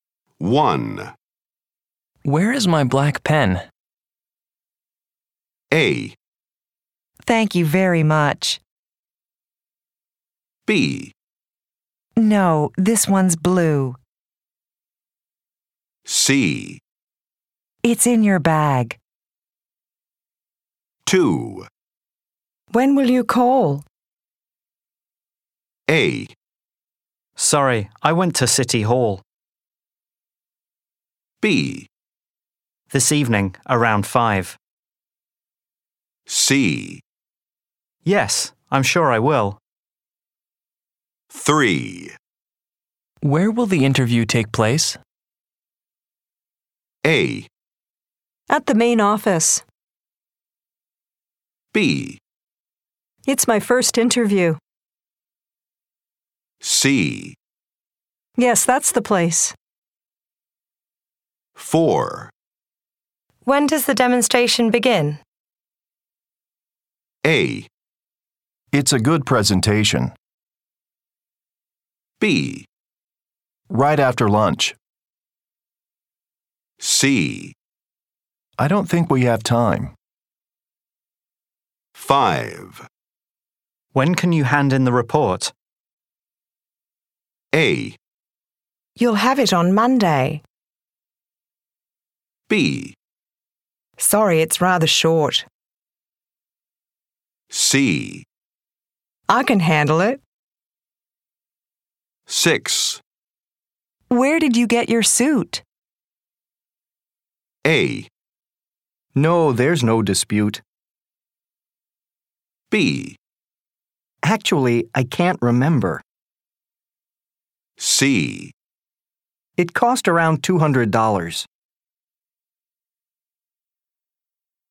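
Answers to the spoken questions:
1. C: It's in your bag.
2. B: This evening, around 5.
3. A: At the main office.
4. B: Right after lunch.
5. A: You'll have it on Monday.
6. B: Actually, I can't remember.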